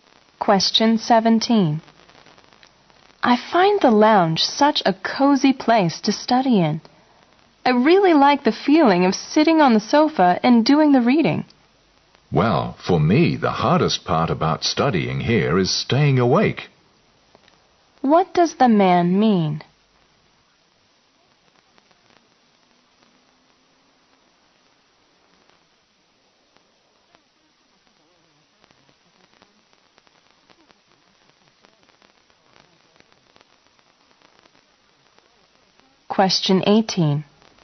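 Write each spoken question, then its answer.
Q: What does the man mean?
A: He finds the lounge too comfortable to stay awake in while studying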